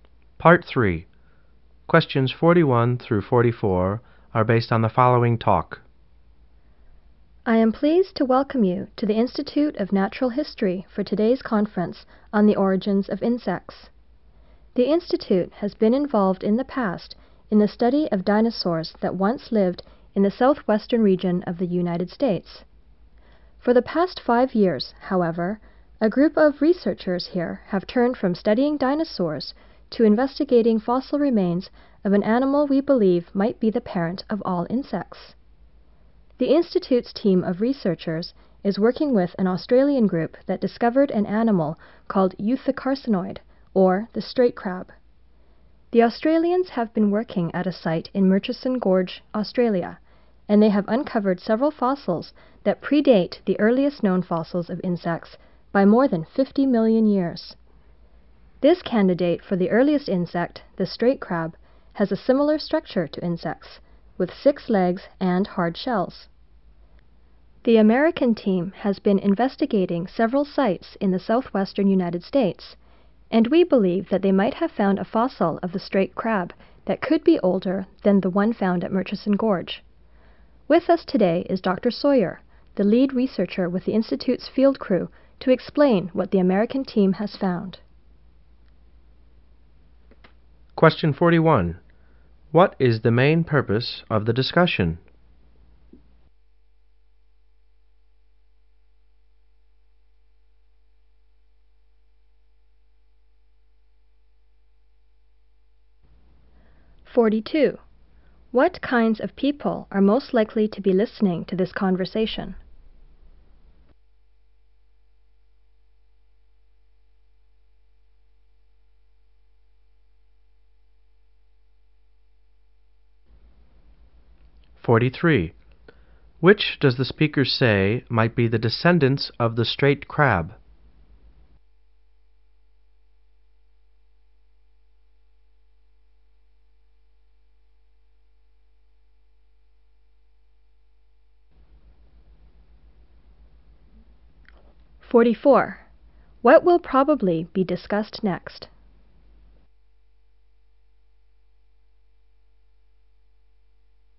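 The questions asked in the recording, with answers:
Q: What is the main purpose of the discussion?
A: To introduce research on the straight crab, possibly the earliest insect ancestor

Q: What kinds of people are most likely to be listening to this conversation?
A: Scientists at a conference

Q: Which does the speaker say might be the descendants of the straight crab?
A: Insects

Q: What will probably be discussed next?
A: What the American team found, explained by Dr. Sawyer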